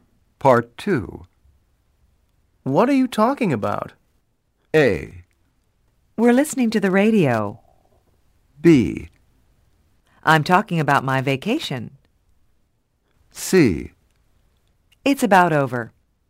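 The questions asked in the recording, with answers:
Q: What are you talking about?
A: B: I'm talking about my vacation.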